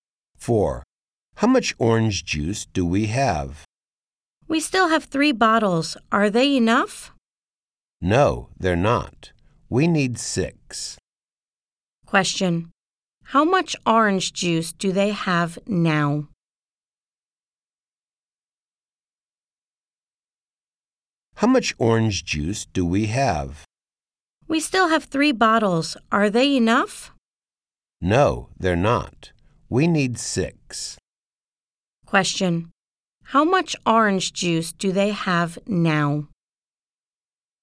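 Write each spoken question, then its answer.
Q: How much orange juice do they have now?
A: 3 bottles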